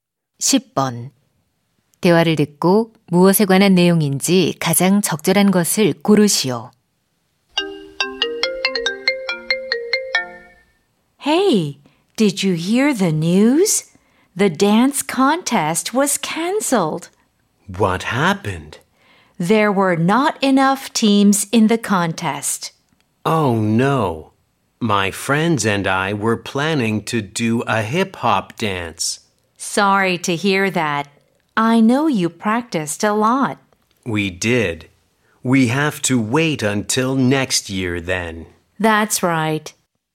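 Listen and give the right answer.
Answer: 댄스 대회 취소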